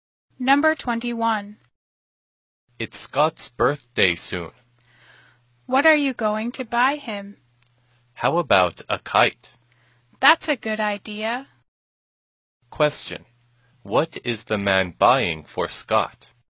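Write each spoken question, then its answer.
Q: Question. What is the man buying for Scott?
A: A kite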